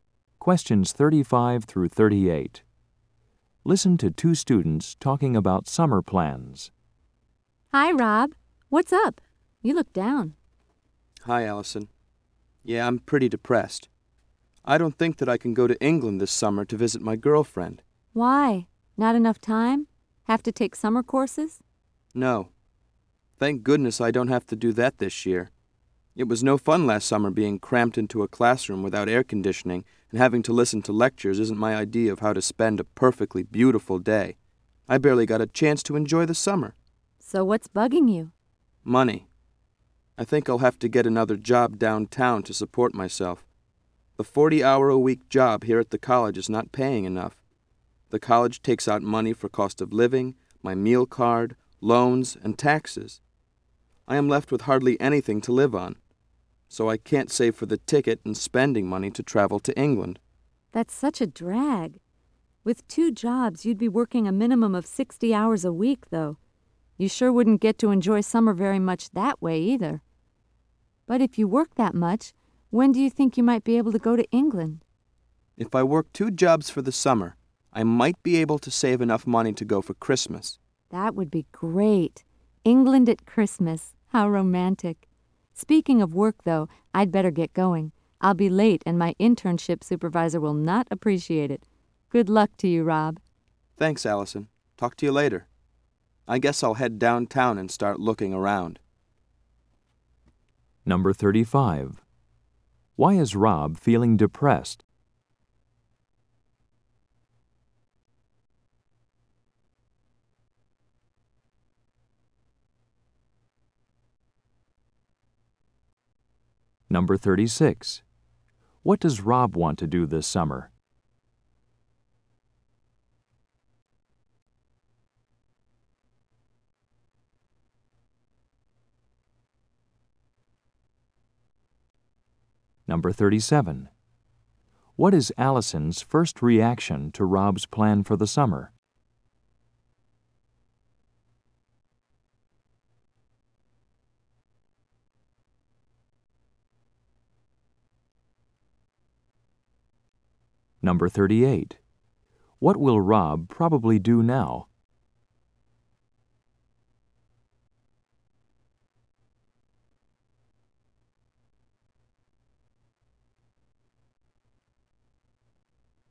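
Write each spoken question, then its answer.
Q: Why is Rob feeling depressed?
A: He doesn't have enough money to go to England to visit his girlfriend

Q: What does Rob want to do this summer?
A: Go to England to visit his girlfriend

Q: What will Rob probably do now?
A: Go downtown to look for another job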